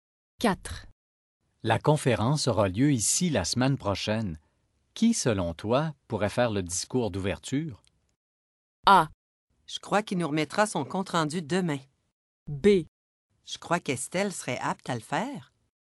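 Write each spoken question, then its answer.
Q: Qui, selon toi, pourrait faire le discours d'ouverture?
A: B: Je crois qu'Estelle serait apte à le faire.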